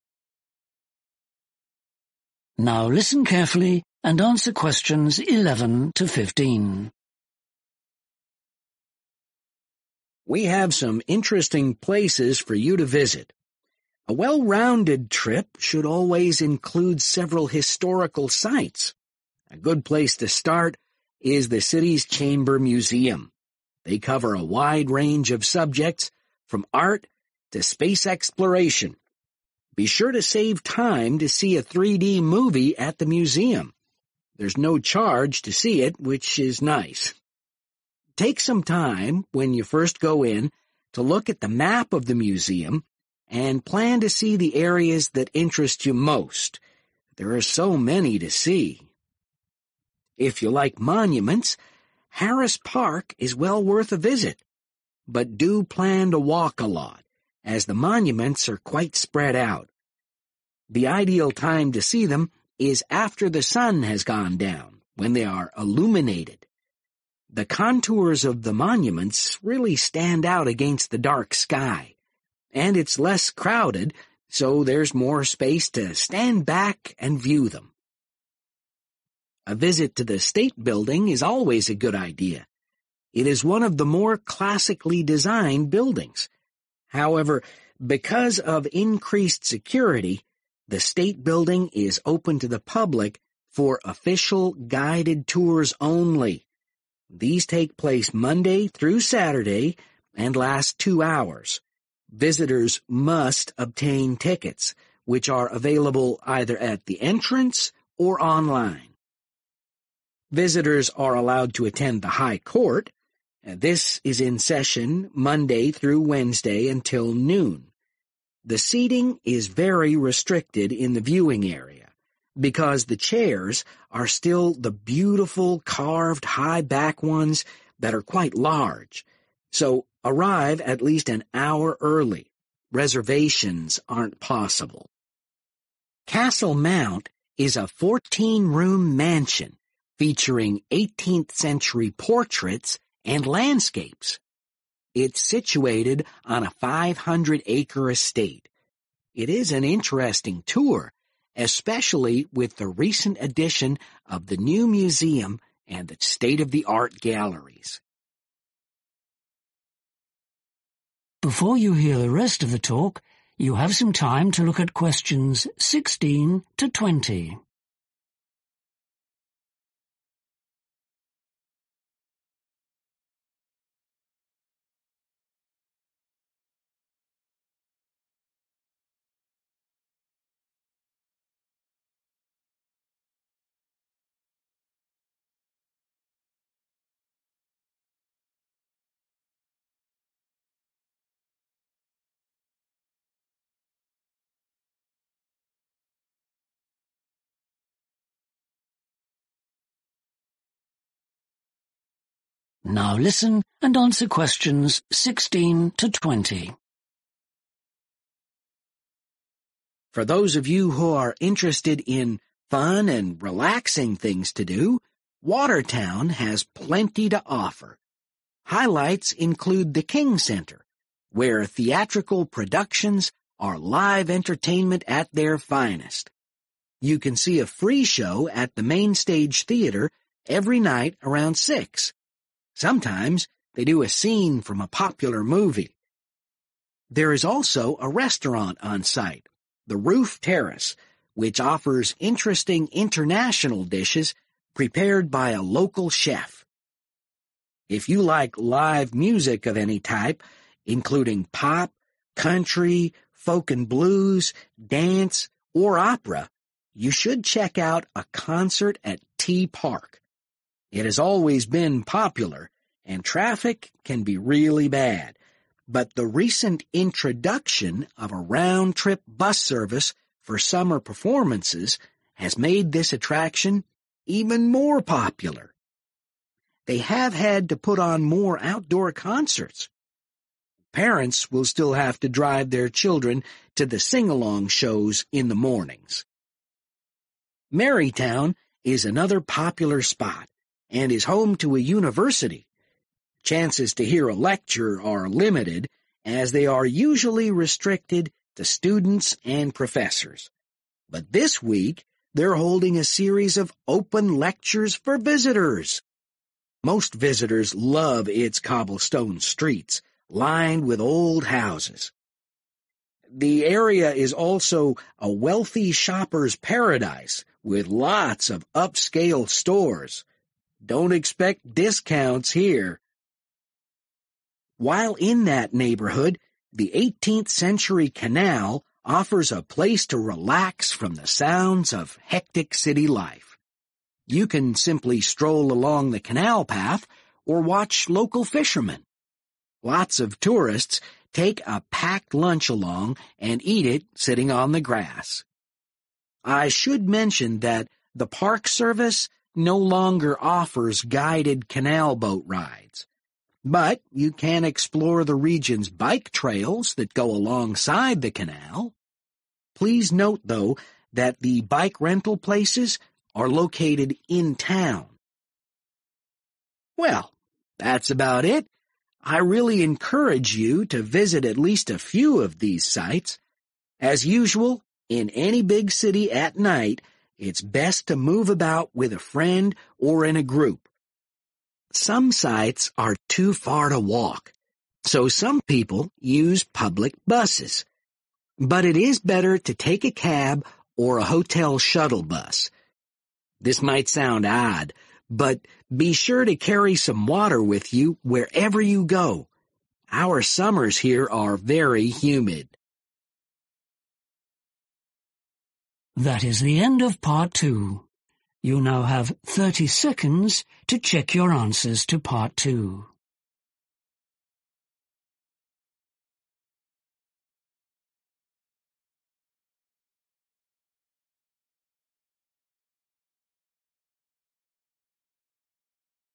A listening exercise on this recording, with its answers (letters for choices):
Choose FIVE answers from the box and write the correct letter, A–G, next to questions 11–15.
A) limited viewing space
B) free movie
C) limited touring time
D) advance reservations only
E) old paintings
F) best seen at night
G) unusual architectural details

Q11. Chamber Museum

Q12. Harris Park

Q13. State Building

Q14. High Court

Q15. Castle Mount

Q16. At the King Centre, you can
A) watch a movie.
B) see a live performance.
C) enjoy local food.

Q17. The 'T Park' attendance has recently improved because of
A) extra summer events.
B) popular activities for kids.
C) better public transport.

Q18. In Marytown, you may be able to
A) find a discount shop.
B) visit an old house.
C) attend a university lecture.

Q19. At the canal, you can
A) have a picnic.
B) rent a bicycle.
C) take a guided tour.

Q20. The speaker concludes by recommending visitors to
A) visit all the sites.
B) carry water.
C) use public transport.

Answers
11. B
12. F
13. C
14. A
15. E
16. B
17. C
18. C
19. A
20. B